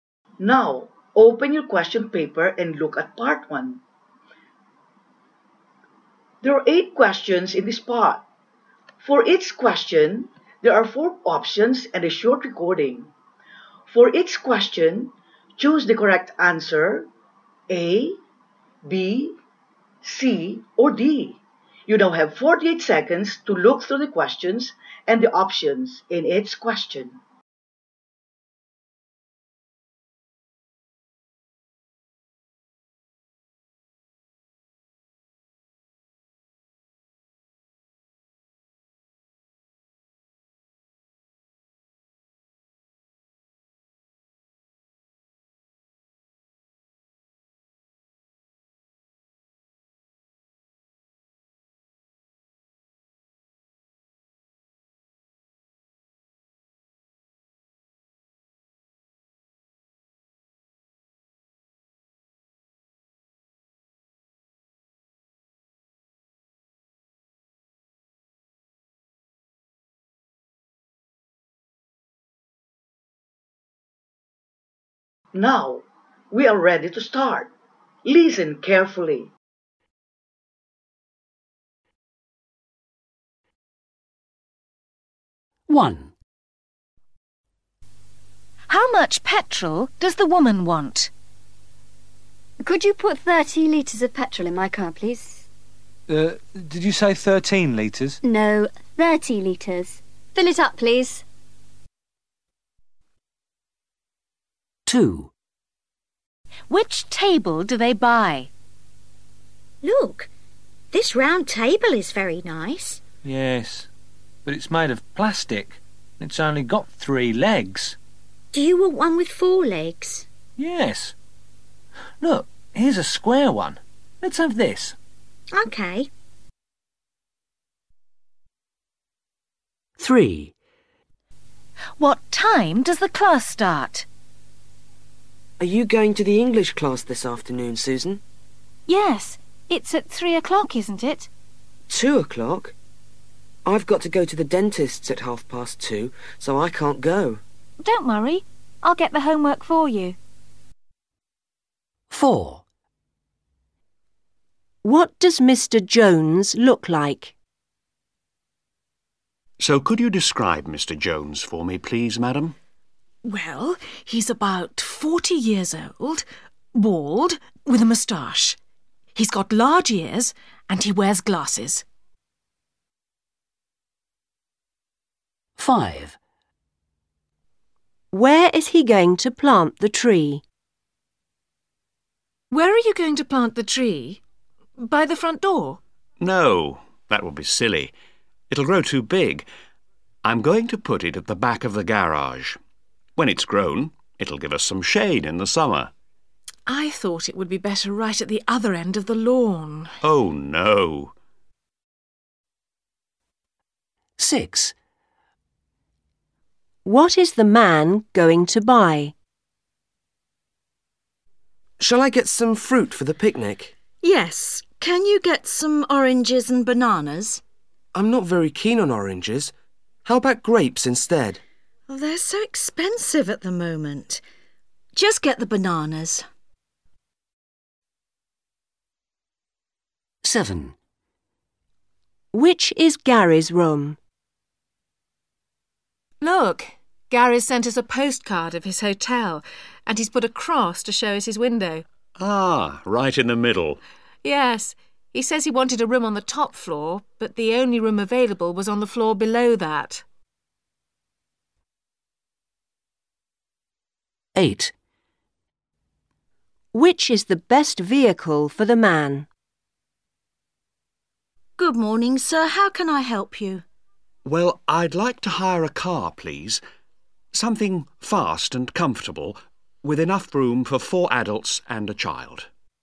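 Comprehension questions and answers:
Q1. How much petrol does the woman want?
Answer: 30 litres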